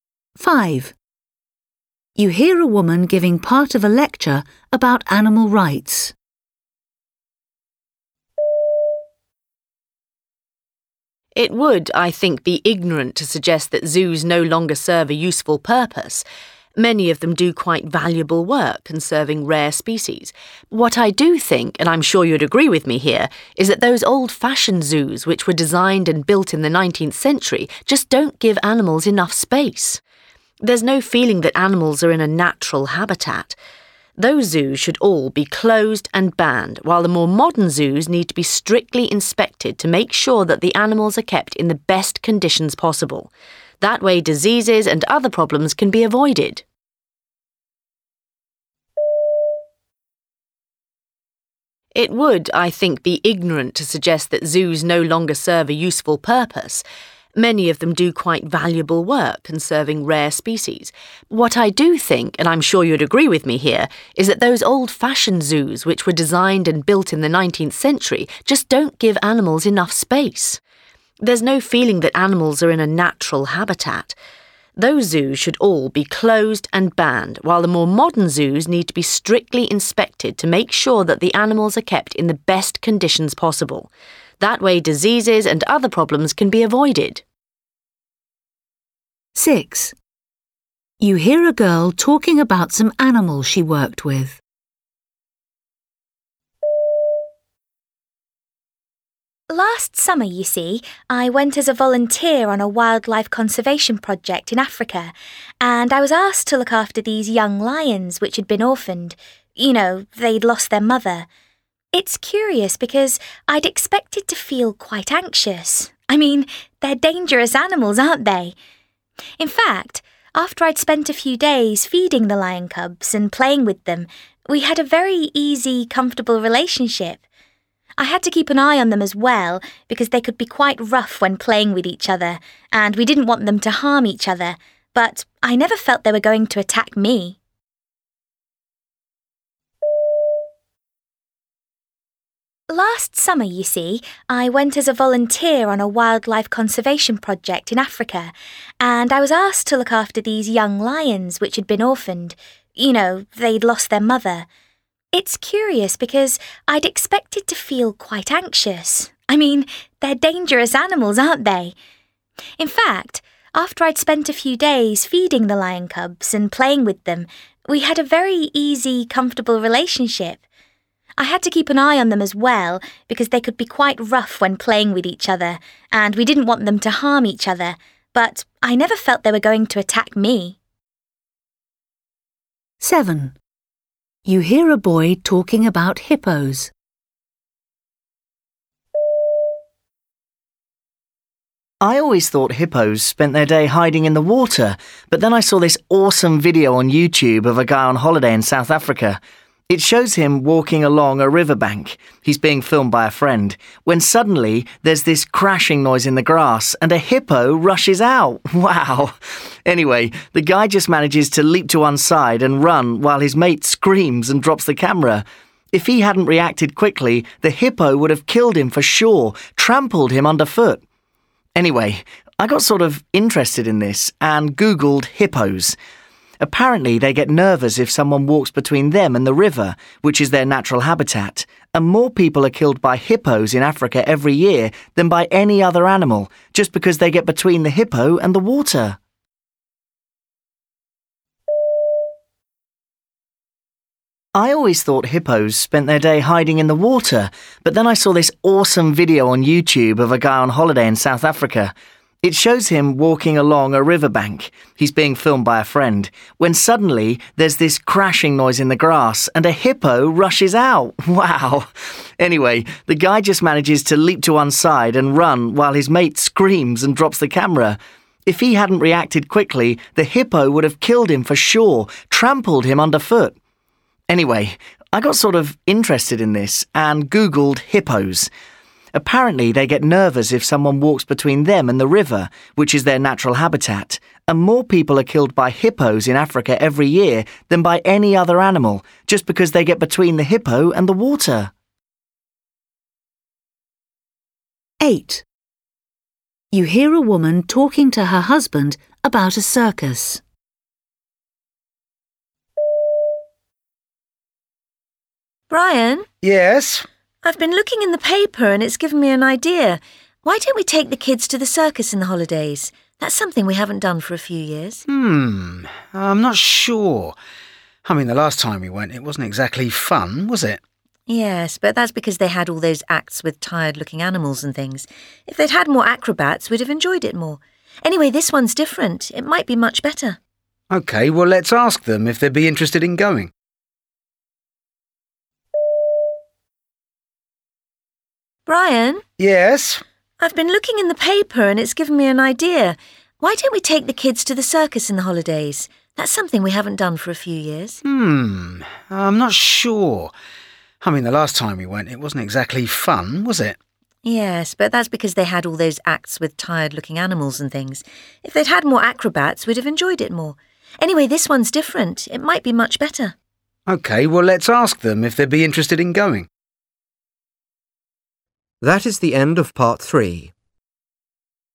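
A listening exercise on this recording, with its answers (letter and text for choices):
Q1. You hear a woman giving part of a lecture about animal rights. She says zoos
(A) should be closely supervised.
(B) are no longer necessary in modern times.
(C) should only be for endangered species.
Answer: (A) should be closely supervised.

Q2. You hear a girl talking about some animals she worked with, When she was with them, she felt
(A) frightened.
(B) relaxed.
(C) strange.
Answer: (B) relaxed.

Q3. You hear a boy talking about hippos. What does he say about them?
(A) They often attack people for no reason.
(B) They are more dangerous than he previously thought.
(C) They are easily frightened.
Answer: (B) They are more dangerous than he previously thought.

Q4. You hear a woman talking to her husband about a circus. She is talking to him in order to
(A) make a suggestion.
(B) make a complaint.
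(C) remind him of something.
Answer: (A) make a suggestion.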